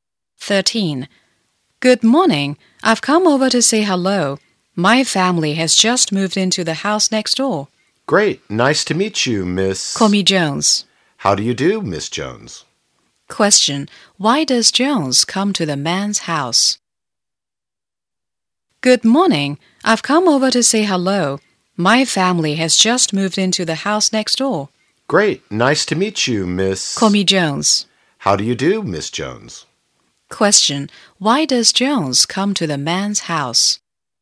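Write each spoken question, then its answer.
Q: Why does Jones come to the man's house?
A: To say hello to her new neighbour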